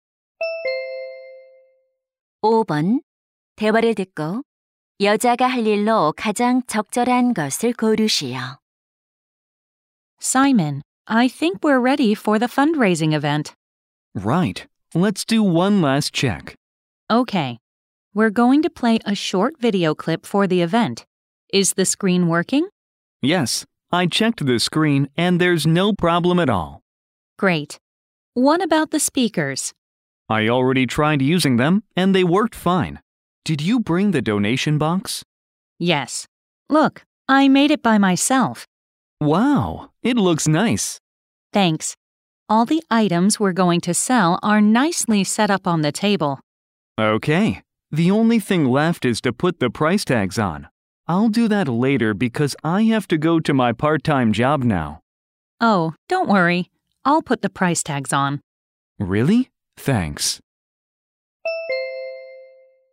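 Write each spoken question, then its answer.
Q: 대화를 듣고 여자가 할 일로 가장 적절한 것을 고르시오.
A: 가격표 붙이기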